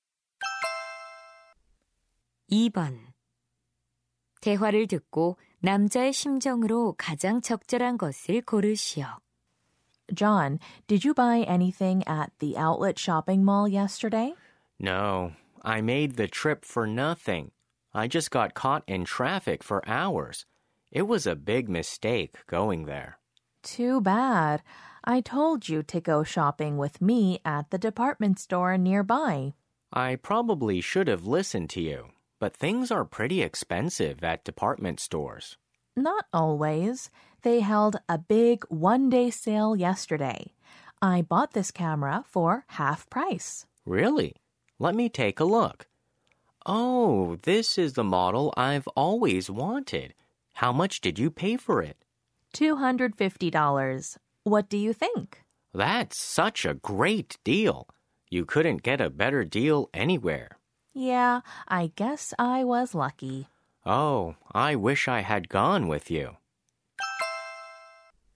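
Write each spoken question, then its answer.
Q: 대화를 듣고 남자의 심정으로 가장 적절한 것을 고르시오.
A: 후회스러움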